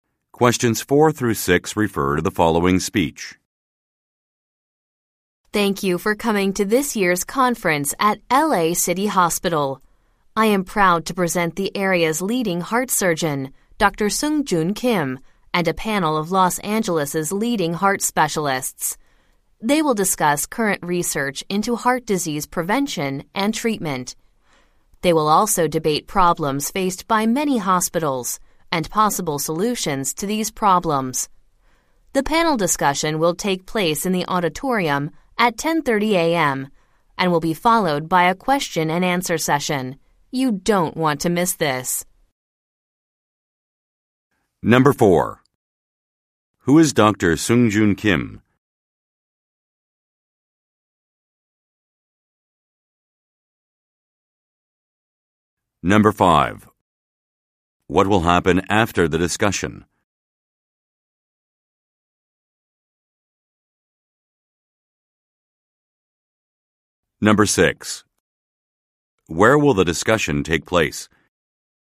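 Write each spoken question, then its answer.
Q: Who is Dr. Sungjoon Kim?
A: The area's leading heart surgeon

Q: What will happen after the discussion?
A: A question and answer session

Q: Where will the discussion take place?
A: In the auditorium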